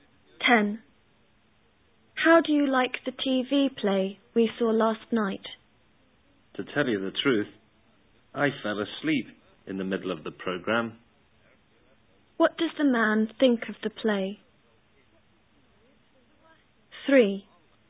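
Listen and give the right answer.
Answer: It was boring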